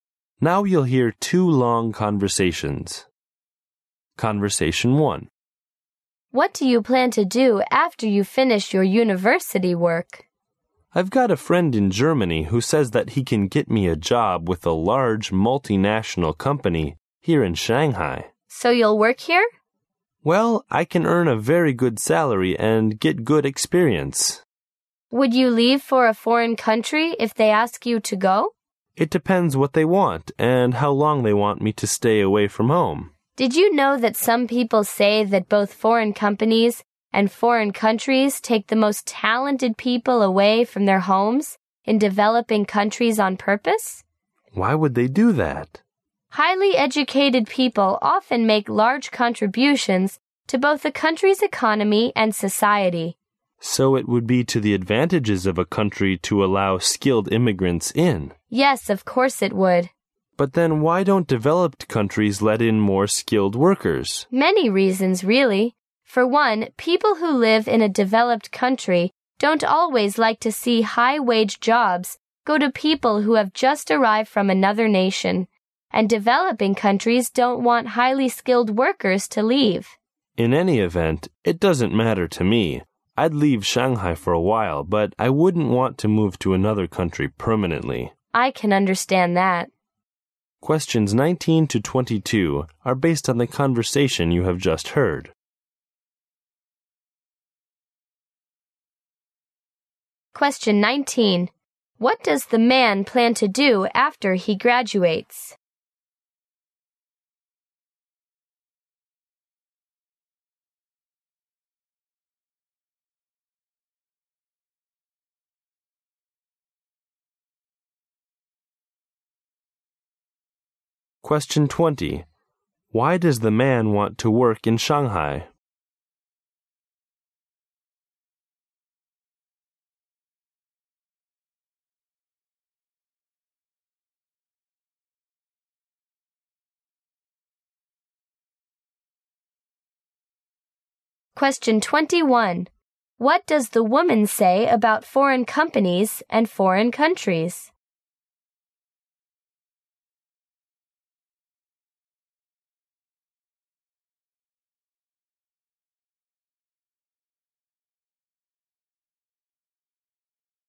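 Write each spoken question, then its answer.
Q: What does the man plan to do after he graduates?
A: Work for a large multinational company in Shanghai

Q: Why does the man want to work in Shanghai?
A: He can earn a very good salary and get good experience

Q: What does the woman say about foreign companies and foreign countries?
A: Some people say they take the most talented people away from developing countries on purpose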